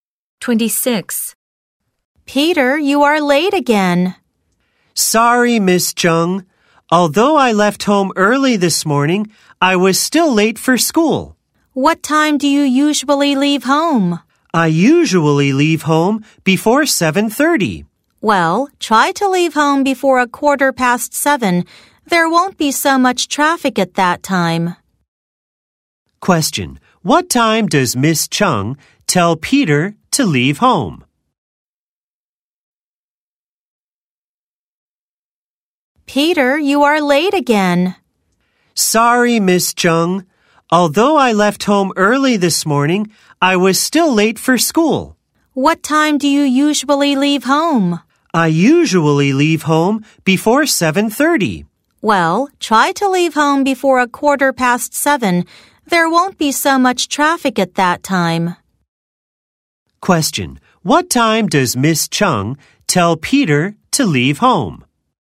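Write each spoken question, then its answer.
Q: What time does Miss Chung tell Peter to leave home?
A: Before 7:15.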